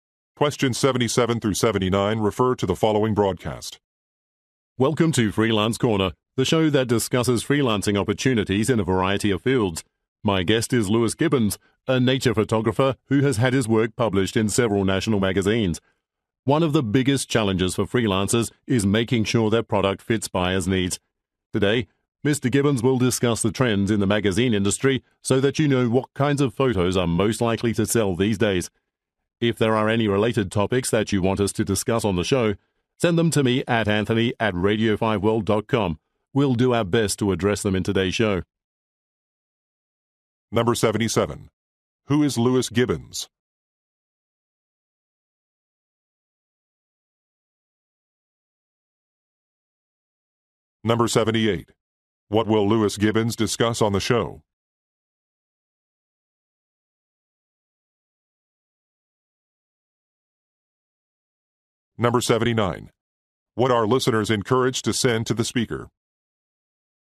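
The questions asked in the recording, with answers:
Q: Who is Lewis Gibbons?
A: A nature photographer

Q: What will Lewis Gibbons discuss on the show?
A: Trends in the magazine industry

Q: What are listeners encouraged to send to the speaker?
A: Related topics they want discussed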